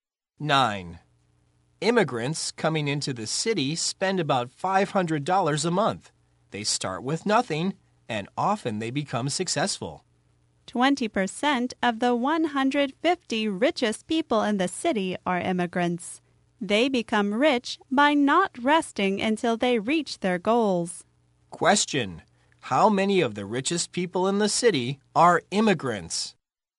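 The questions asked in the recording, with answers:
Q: how many of the richest people in the city are immigrants?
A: 30 (20% of 150)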